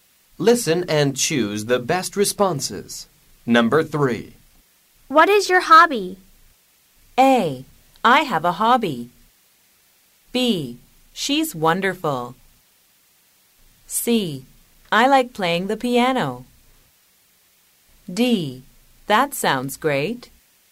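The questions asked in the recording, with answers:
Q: What is your hobby?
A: C: I like playing the piano.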